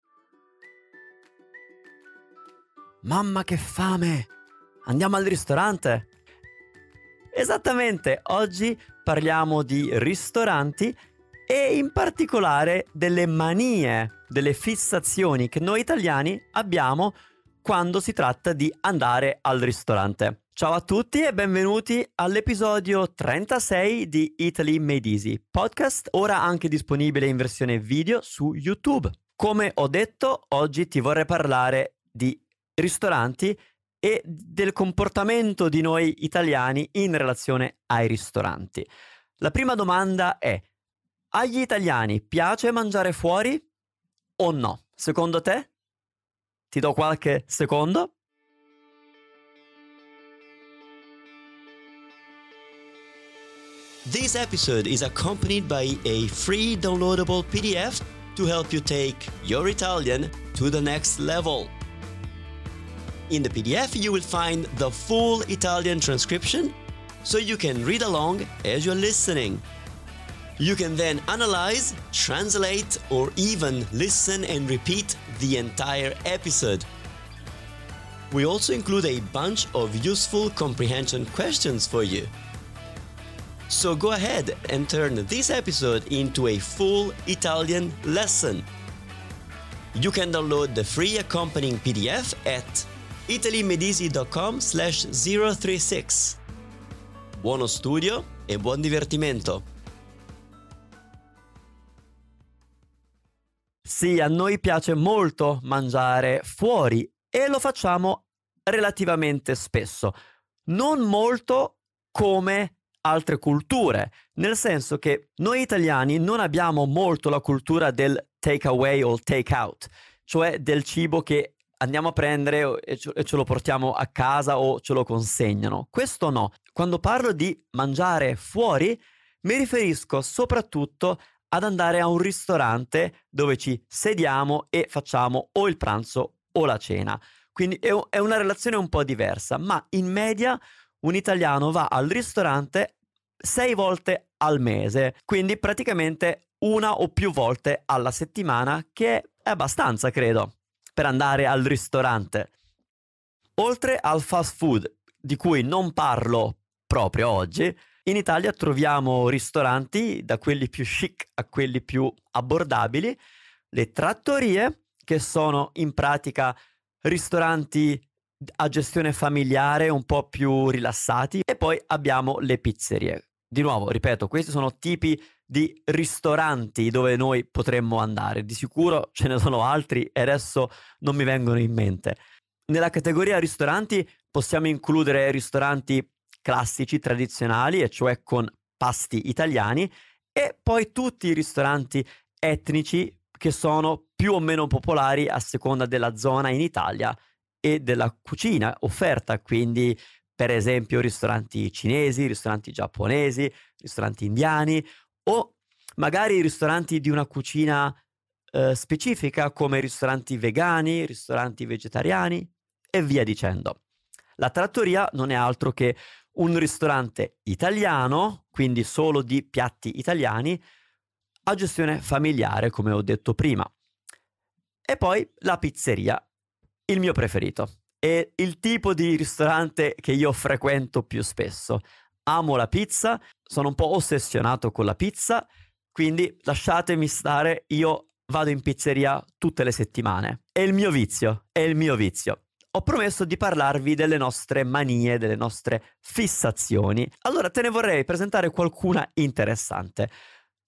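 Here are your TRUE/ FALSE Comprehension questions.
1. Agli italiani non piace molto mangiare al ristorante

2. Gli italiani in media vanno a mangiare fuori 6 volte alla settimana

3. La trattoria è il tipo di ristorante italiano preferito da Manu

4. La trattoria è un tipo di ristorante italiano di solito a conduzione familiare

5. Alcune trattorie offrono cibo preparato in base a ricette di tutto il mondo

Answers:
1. False
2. False
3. False
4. True
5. False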